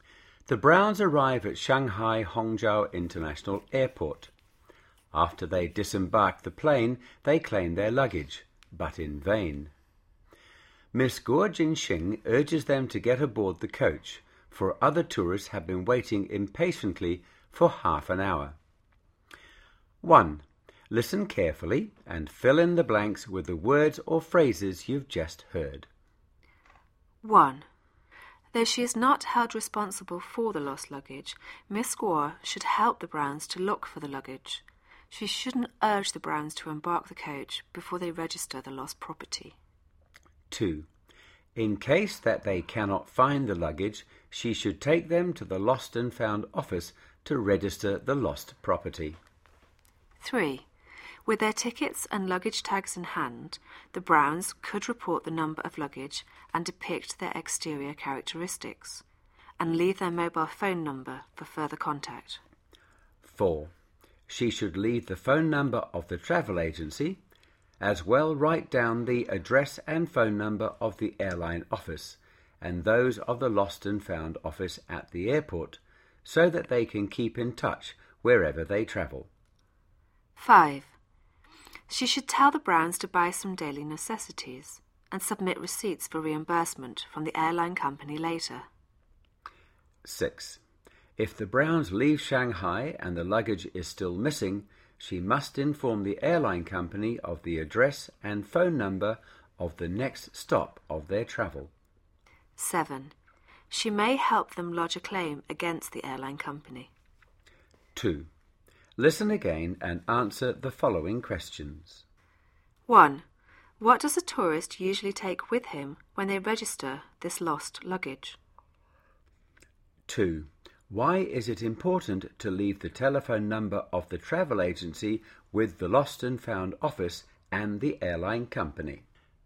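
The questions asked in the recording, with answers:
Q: What does a tourist usually take with him when they register this lost luggage?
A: Their tickets and luggage tags

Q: Why is it important to leave the telephone number of the travel agency with the lost and found office and the airline company?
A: So that they can keep in touch wherever the tourists travel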